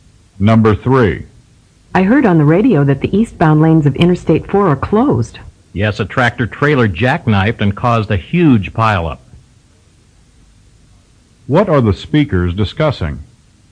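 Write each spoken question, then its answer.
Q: What are the speakers discussing?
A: A traffic accident (pileup) that closed the eastbound lanes of Interstate 4.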